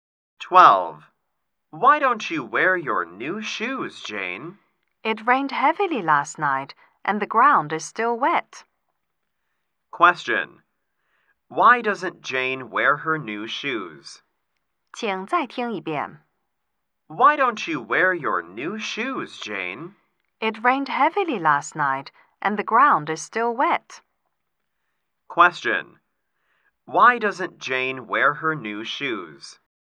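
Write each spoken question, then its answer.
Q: Question. Why doesn't Jane wear her new shoes?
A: Because the ground is still wet after heavy rain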